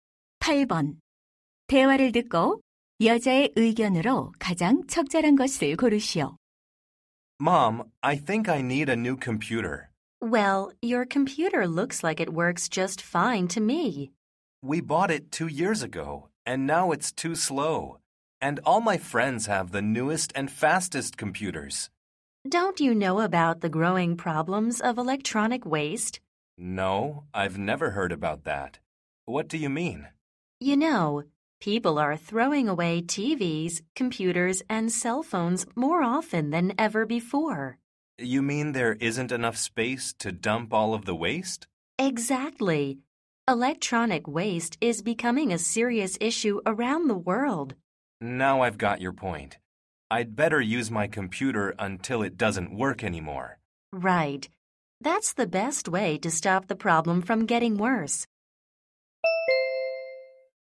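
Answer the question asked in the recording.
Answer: 전자 폐기물을 줄이기 위해 전자제품을 오래 써야 한다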